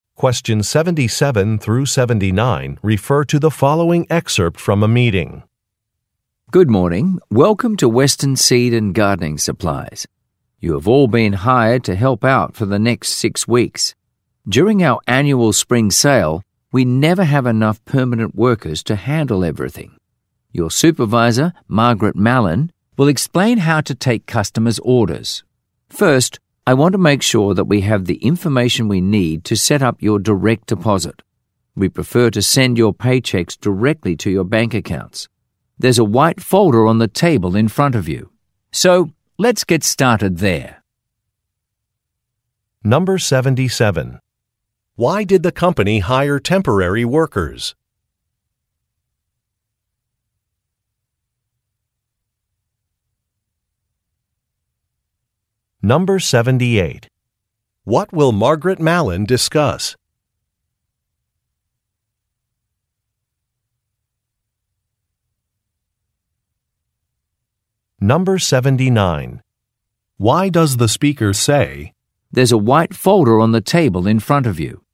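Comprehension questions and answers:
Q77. Why did the company hire temporary workers?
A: It is very busy this time of year.

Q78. What will Margaret Malin discuss?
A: How to take customers' orders

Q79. Why does the speaker say, "There's a white folder on the table in front of you"?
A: To ask for some banking information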